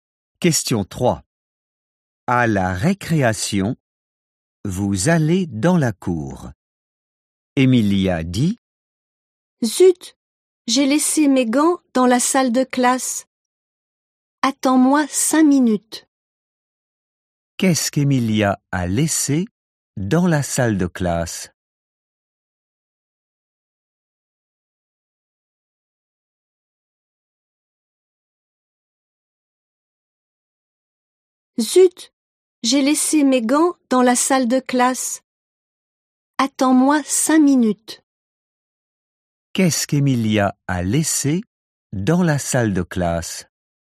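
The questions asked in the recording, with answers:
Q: Qu'est-ce qu'Emilia a laissé dans la salle de classe ?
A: Ses gants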